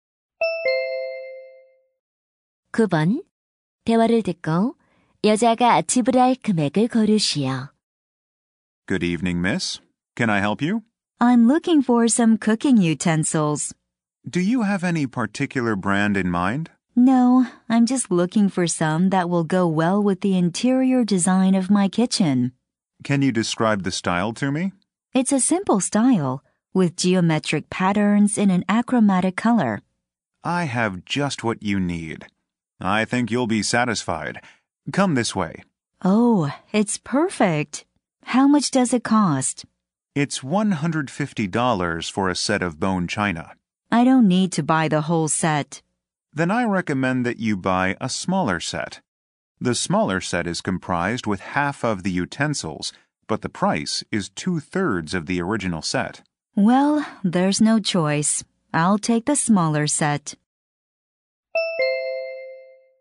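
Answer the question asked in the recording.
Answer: $100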